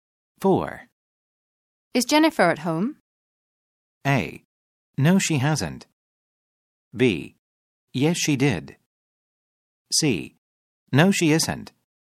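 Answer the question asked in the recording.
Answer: C: No, she isn't.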